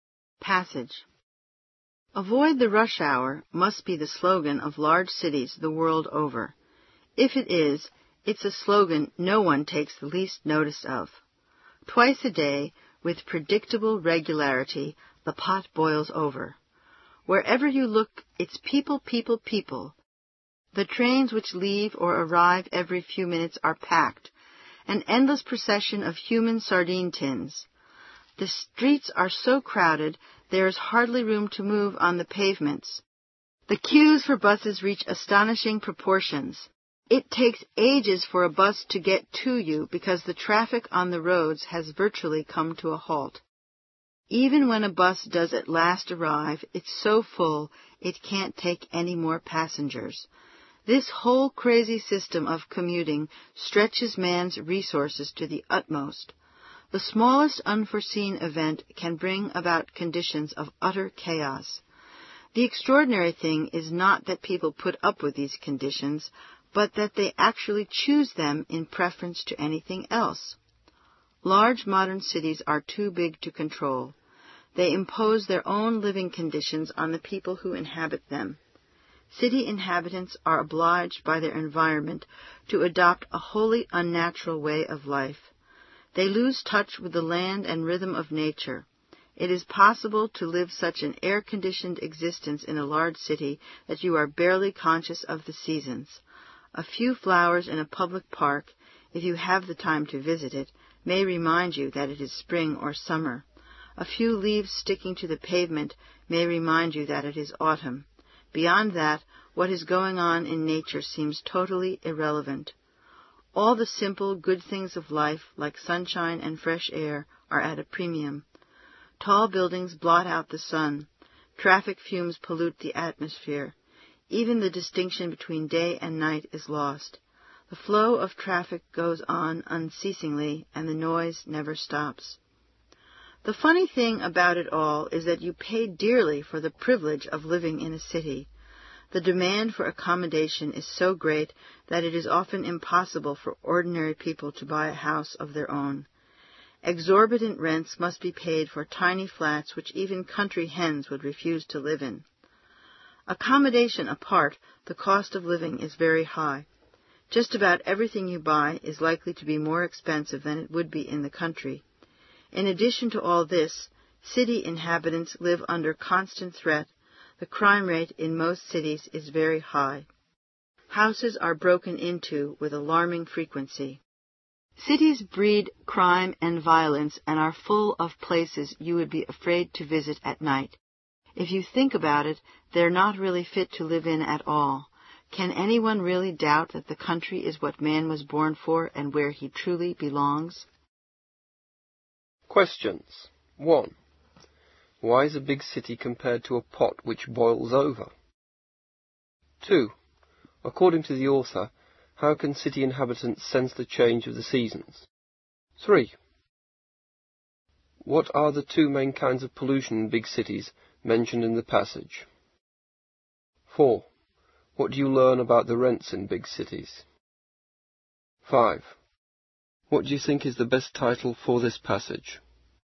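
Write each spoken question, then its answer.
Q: Why is a big city compared to a pot which boils over?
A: Because twice a day at rush hour it is overcrowded with people everywhere.

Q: According to the author, how can city inhabitants sense the change of the seasons?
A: From a few flowers in a public park or a few leaves sticking to the pavement.

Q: What are the two main kinds of pollution in big cities mentioned in the passage?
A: Air pollution from traffic fumes and noise pollution.

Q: What do you learn about the rents in big cities?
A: They are exorbitant, even for tiny flats.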